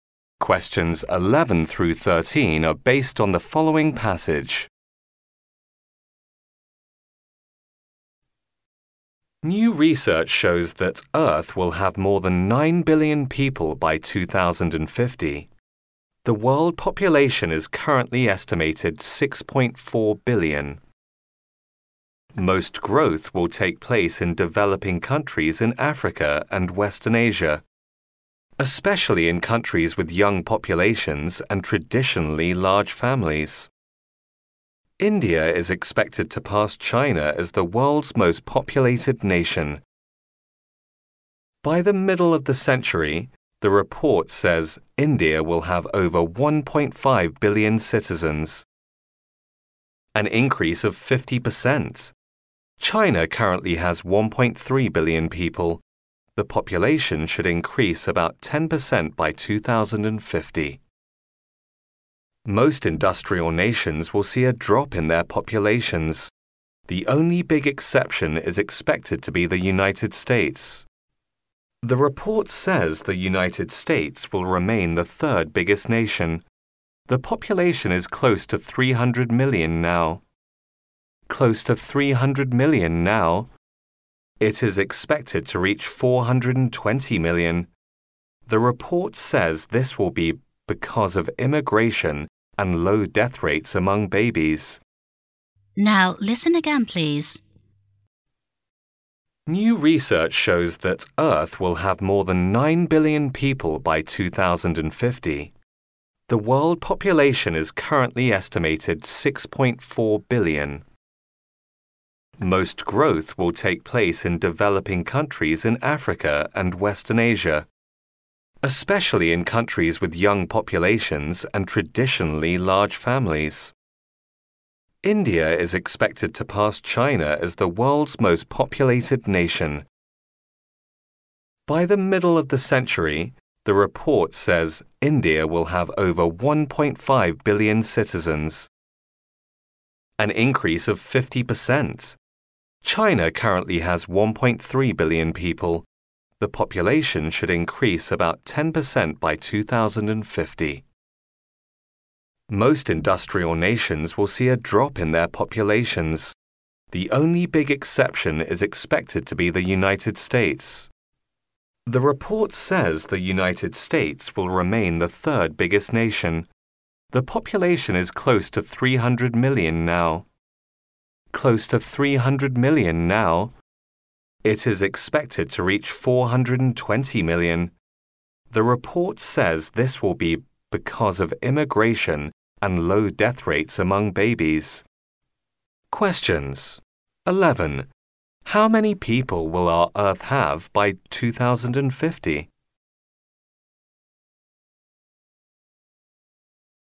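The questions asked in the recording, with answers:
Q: How many people will our Earth have by 2050?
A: More than 9 billion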